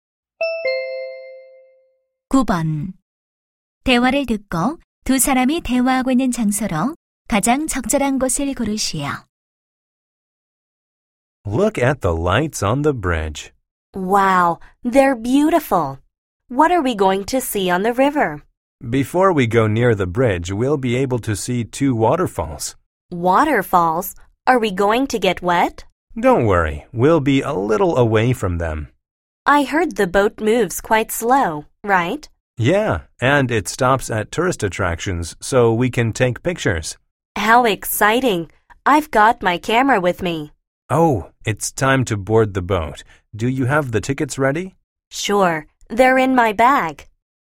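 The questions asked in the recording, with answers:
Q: 대화를 듣고 두 사람이 대화하고 있는 장소로 가장 적절한 곳을 고르시오.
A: 유람선 선착장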